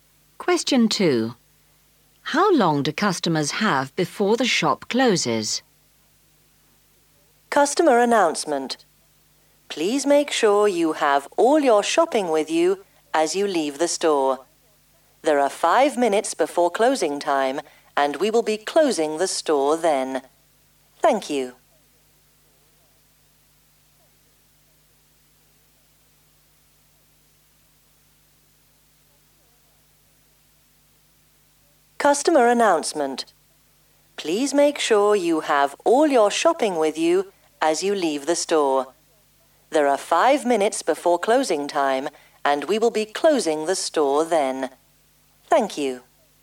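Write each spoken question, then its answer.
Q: How long do customers have before the shop closes?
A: 5 minutes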